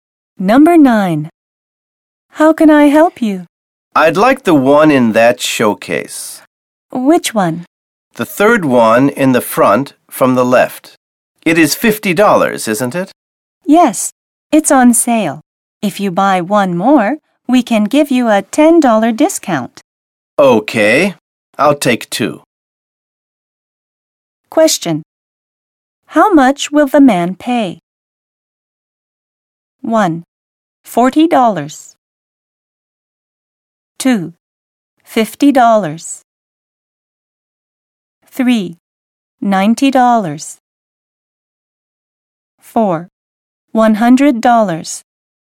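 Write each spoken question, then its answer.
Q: How much will the man pay?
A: 3: $90.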